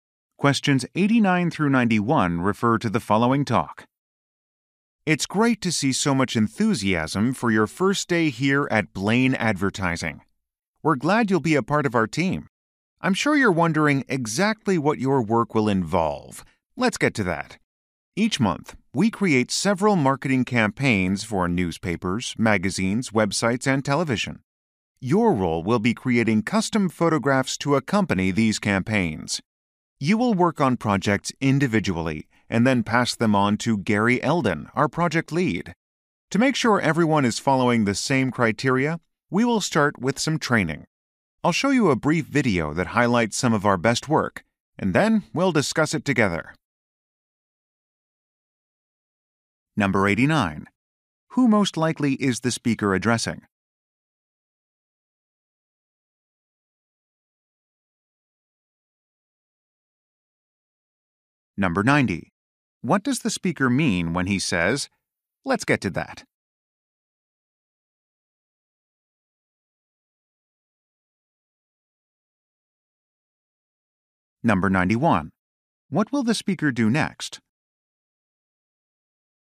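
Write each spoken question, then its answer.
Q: Who most likely is the speaker addressing?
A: New photographers

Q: What does the speaker mean when he says, "Let's get to that"?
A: He will explain what their work involves

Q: What will the speaker do next?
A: Show a video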